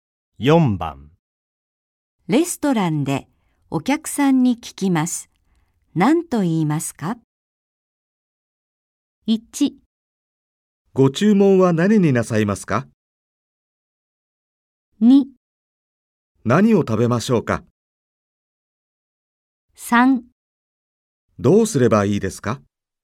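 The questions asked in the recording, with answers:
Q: レストランでお客さんに聞きます。何と言いますか?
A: 1: ご注文は何になさいますか?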